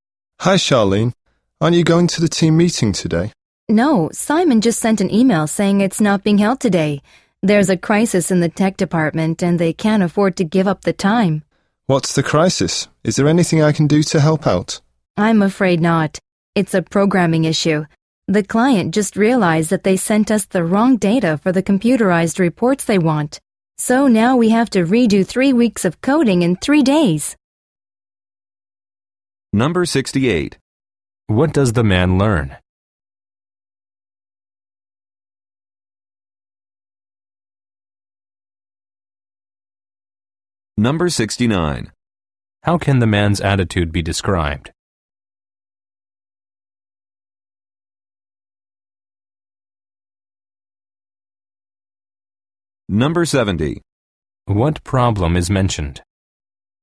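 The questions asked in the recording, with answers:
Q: What does the man learn?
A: The team meeting has been canceled

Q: What problem is mentioned?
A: The client sent the wrong data, so 3 weeks of coding must be redone in 3 days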